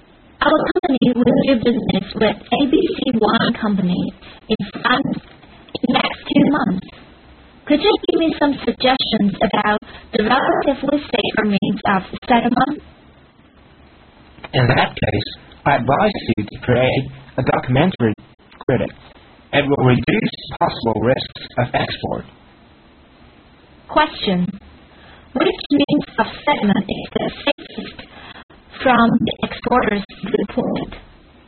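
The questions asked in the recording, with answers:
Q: Which means of settlement is the safest from the exporter's viewpoint?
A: A documentary credit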